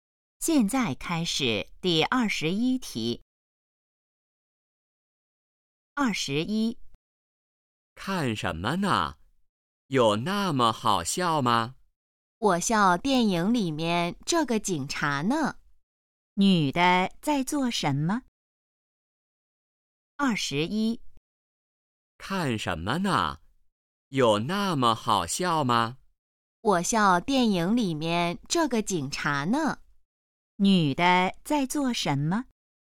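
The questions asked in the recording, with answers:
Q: 女的在做什么?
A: 看电影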